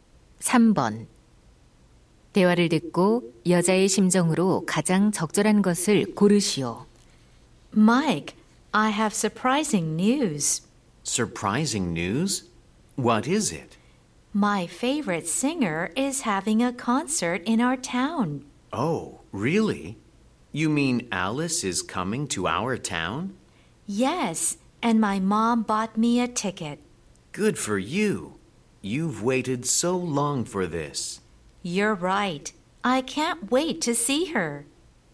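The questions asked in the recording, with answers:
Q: 대화를 듣고 여자의 심정으로 가장 적절한 것을 고르시오.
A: 신남, 기대됨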